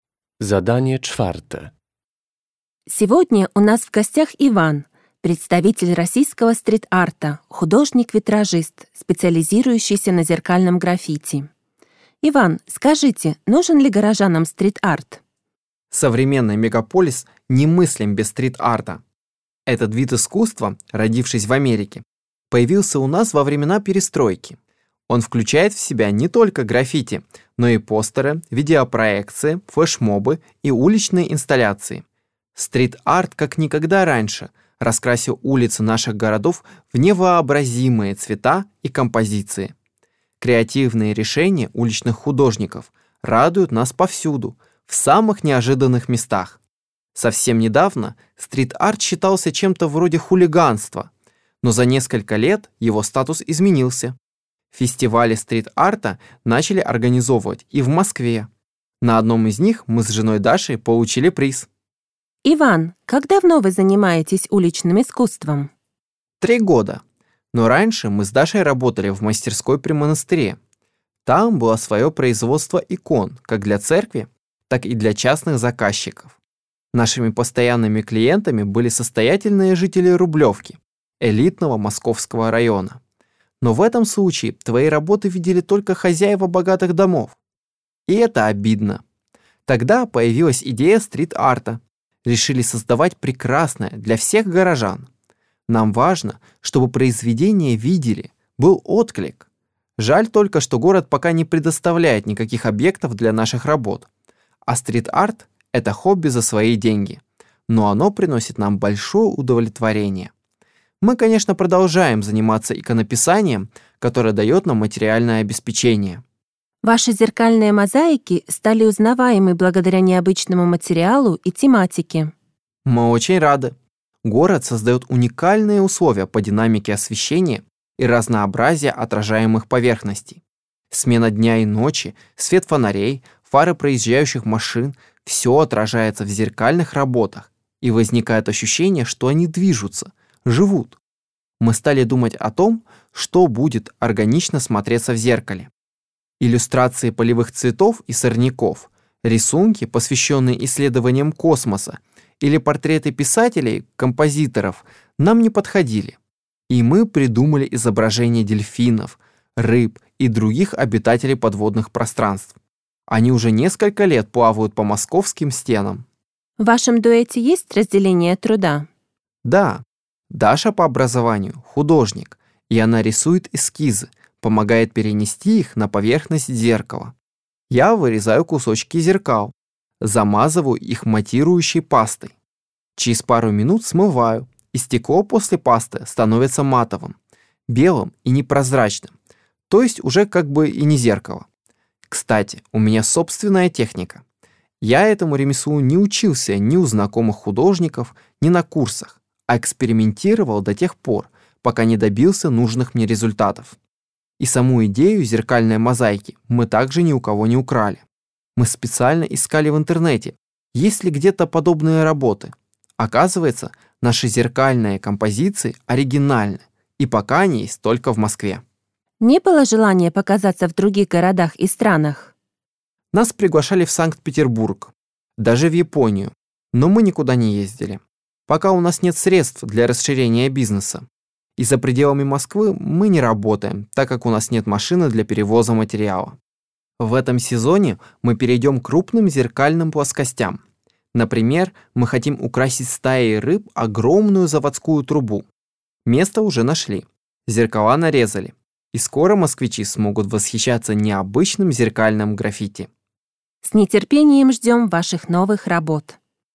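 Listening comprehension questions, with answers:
Z podanych odpowiedzi wybierz właściwą, zgodną z treścią nagrania.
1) В начале интервью Иван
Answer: рассказывает о развитии стрит-арта и его статусе в городе

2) Художники занялись стрит-артом, потому что они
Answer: хотели, чтобы их работы видели все горожане

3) Работы Даши и Ивана изображают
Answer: дельфинов, рыб и других подводных обитателей

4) Технику зеркальной мозаики Иван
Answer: разработал сам путём экспериментов

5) В ближайшее время художники намерены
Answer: украсить стаей рыб огромную заводскую трубу

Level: rozszerzony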